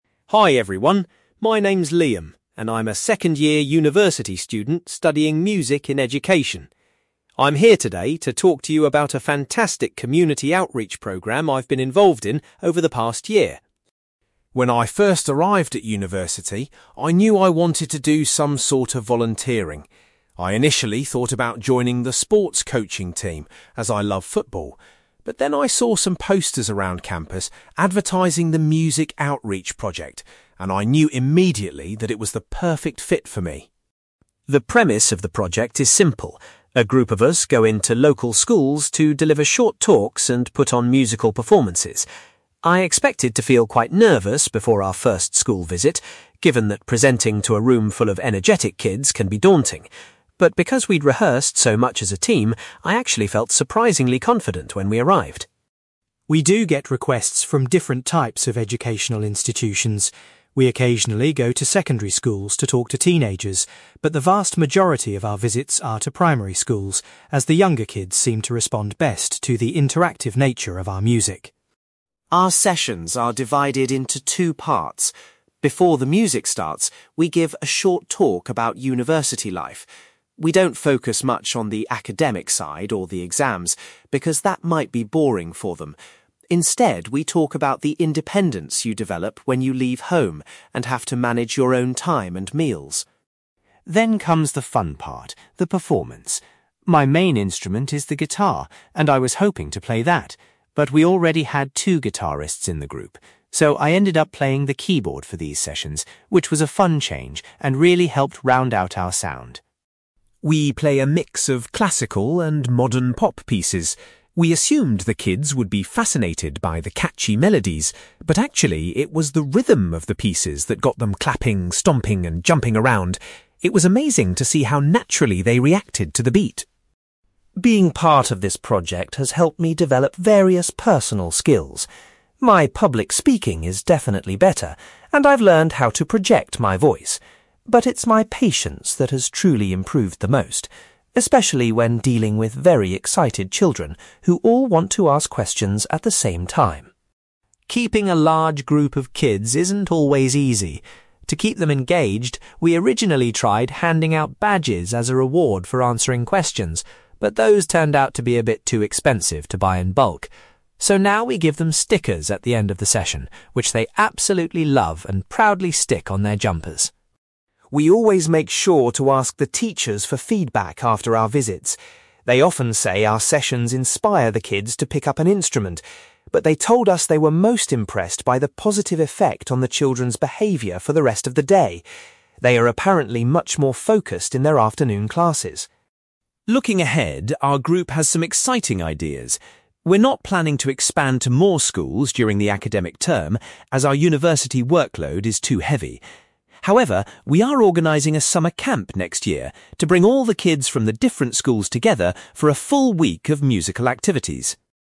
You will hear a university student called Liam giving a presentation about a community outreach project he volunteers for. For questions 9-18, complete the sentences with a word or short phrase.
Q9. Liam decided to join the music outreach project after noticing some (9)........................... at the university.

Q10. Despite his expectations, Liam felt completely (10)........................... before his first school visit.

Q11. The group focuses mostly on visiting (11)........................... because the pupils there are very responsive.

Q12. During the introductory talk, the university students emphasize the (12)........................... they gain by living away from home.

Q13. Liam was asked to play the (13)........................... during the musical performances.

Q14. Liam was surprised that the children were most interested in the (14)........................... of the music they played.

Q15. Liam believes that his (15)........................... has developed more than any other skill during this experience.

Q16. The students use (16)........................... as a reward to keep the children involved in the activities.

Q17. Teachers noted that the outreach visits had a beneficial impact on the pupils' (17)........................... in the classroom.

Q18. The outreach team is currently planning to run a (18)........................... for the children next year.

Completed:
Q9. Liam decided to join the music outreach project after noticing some posters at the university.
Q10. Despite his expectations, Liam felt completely confident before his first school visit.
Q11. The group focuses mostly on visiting primary schools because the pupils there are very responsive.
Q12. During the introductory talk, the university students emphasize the independence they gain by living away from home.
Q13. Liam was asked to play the keyboard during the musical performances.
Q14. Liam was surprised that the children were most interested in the rhythm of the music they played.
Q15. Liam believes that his patience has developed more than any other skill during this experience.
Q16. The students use stickers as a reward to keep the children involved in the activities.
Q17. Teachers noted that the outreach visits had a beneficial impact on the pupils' behaviour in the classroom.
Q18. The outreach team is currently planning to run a summer camp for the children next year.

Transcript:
Liam: Hi everyone, my name is Liam, and I'm a second-year university student studying Music and Education. I'm here today to talk to you about a fantastic community outreach program I've been involved in over the past year.
When I first arrived at university, I knew I wanted to do some sort of volunteering. I initially thought about joining the sports coaching team, as I love football. But then I saw some posters around campus advertising the music outreach project, and I knew immediately that it was the perfect fit for me.
The premise of the project is simple: a group of us go into local schools to deliver short talks and put on musical performances. I expected to feel quite nervous before our first school visit, given that presenting to a room full of energetic kids can be daunting. But because we'd rehearsed so much as a team, I actually felt surprisingly confident when we arrived.
We do get requests from different types of educational institutions. We occasionally go to secondary schools to talk to teenagers, but the vast majority of our visits are to primary schools, as the younger kids seem to respond best to the interactive nature of our music.
Our sessions are divided into two parts. Before the music starts, we give a short talk about university life. We don't focus much on the academic side or the exams, because that might be boring for them. Instead, we talk about the independence you develop when you leave home and have to manage your own time and meals.
Then comes the fun part—the performance. My main instrument is the guitar, and I was hoping to play that. But we already had two guitarists in the group. So, I ended up playing the keyboard for these sessions, which was a fun change and really helped round out our sound.
We play a mix of classical and modern pop pieces. We assumed the kids would be fascinated by the catchy melodies, but actually, it was the rhythm of the pieces that got them clapping, stomping, and jumping around. It was amazing to see how naturally they reacted to the beat.
Being part of this project has helped me develop various personal skills. My public speaking is definitely better, and I've learned how to project my voice. But it's my patience that has truly improved the most, especially when dealing with very excited children who all want to ask questions at the same time.
Keeping a large group of kids focused isn't always easy. To keep them engaged, we originally tried handing out badges as a reward for answering questions, but those turned out to be a bit too expensive to buy in bulk. So now we give them stickers at the end of the session, which they absolutely love and proudly stick on their jumpers.
We always make sure to ask the teachers for feedback after our visits. They often say our sessions inspire the kids to pick up an instrument, but they told us they were most impressed by the positive effect on the children's behaviour for the rest of the day. They are apparently much more focused in their afternoon classes.
Looking ahead, our group has some exciting ideas. We're not planning to expand to more schools during the academic term, as our university workload is too heavy. However, we are organising a summer camp next year to bring all the kids from the different schools together for a full week of musical activities.

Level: B2